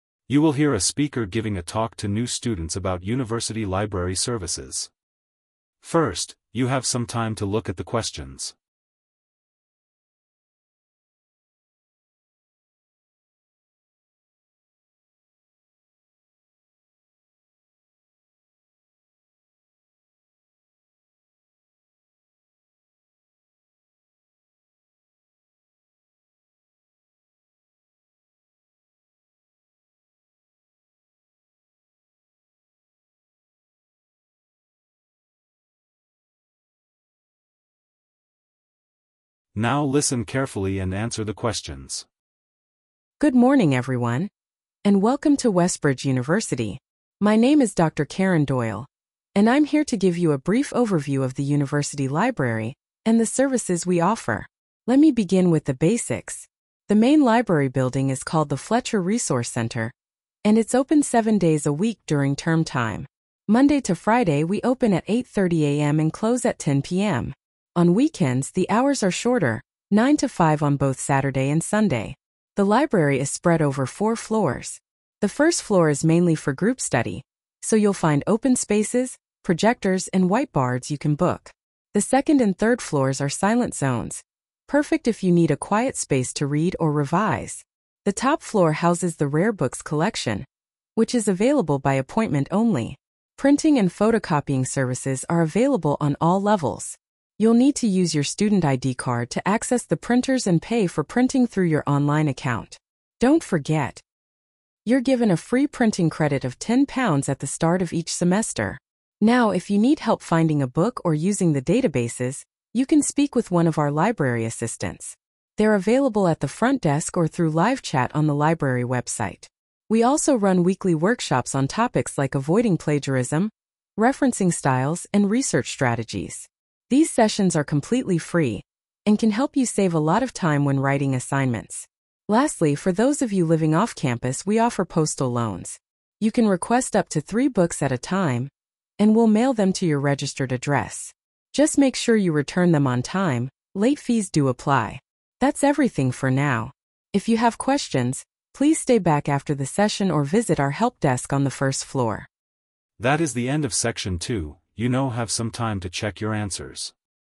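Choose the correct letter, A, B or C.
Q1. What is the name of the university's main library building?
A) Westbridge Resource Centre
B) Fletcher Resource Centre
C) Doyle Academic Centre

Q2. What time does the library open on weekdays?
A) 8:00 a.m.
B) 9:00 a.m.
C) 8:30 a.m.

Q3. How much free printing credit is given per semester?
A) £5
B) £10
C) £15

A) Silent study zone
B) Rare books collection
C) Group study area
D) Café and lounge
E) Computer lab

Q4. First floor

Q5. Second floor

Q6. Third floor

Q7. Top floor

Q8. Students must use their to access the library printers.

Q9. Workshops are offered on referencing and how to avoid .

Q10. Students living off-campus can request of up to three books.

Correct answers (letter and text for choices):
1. B) Fletcher Resource Centre
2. C) 8:30 a.m.
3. B) £10
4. C) Group study area
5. A) Silent study zone
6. A) Silent study zone
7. B) Rare books collection
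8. student ID card
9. plagiarism
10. postal loans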